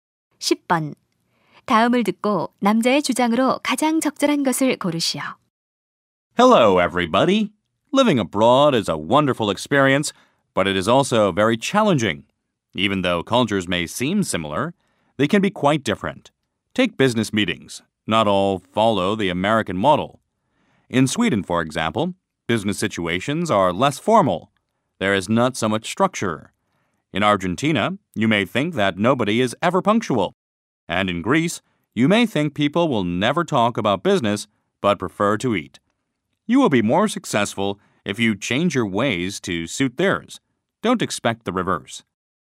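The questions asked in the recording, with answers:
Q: 다음을 듣고 남자의 주장으로 가장 적절한 것을 고르시오.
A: 외국에서는 그 나라의 방식에 맞춰야 한다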